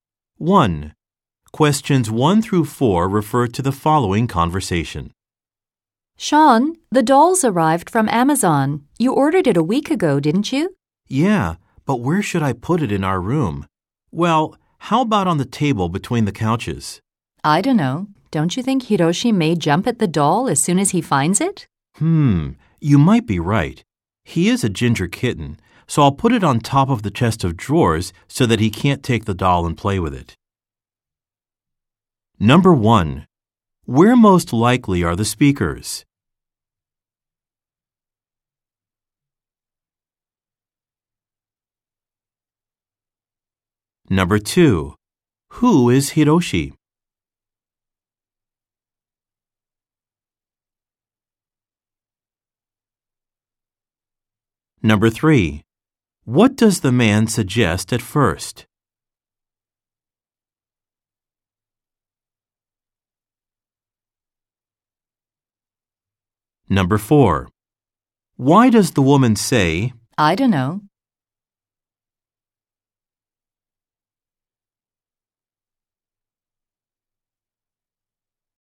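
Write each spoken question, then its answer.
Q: Where most likely are the speakers?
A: At home, in their room

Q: Who is Hiroshi?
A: A ginger kitten (their pet cat)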